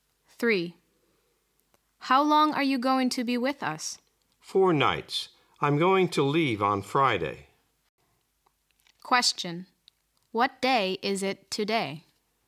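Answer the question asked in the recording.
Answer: Monday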